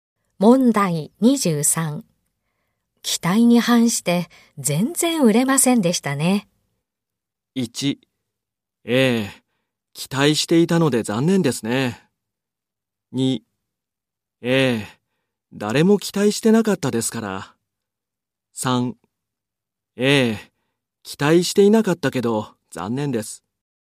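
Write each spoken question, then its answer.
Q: 期待に反して全然売れませんでしたね。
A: 1: ええ、期待していたので残念ですね。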